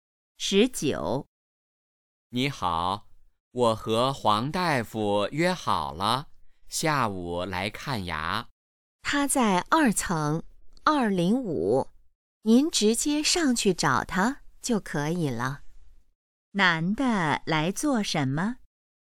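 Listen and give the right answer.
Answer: 看牙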